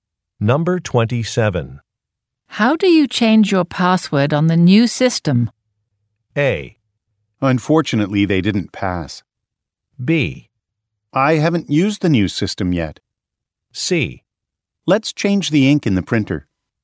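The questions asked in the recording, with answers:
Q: How do you change your password on the new system?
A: B: I haven't used the new system yet.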